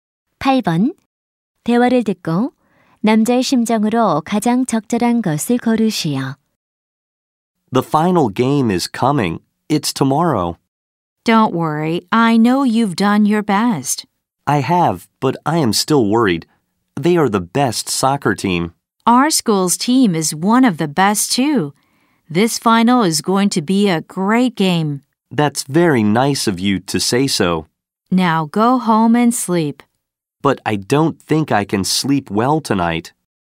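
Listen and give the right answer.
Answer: 걱정됨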